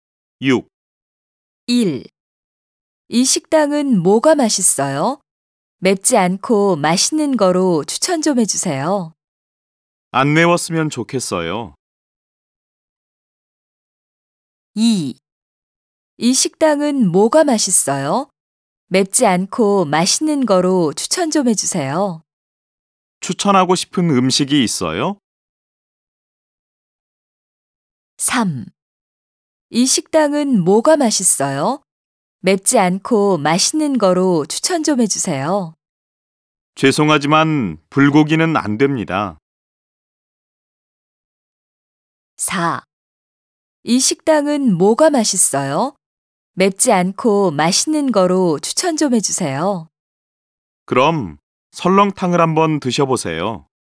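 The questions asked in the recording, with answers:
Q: 이 식당은 뭐가 맛있어요? 맵지 않고 맛있는 거로 추천 좀 해주세요.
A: 4: 그럼 설렁탕을 한번 드셔보세요.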